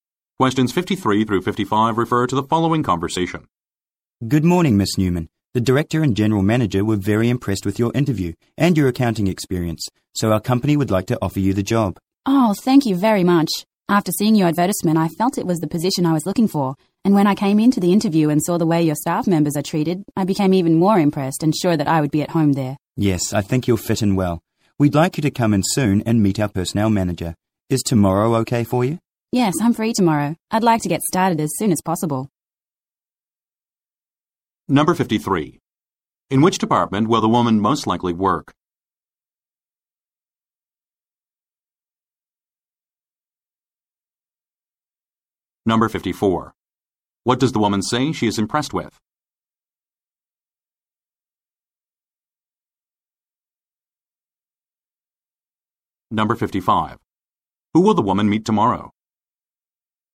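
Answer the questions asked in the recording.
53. Accounting
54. The way the staff members are treated
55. The personnel manager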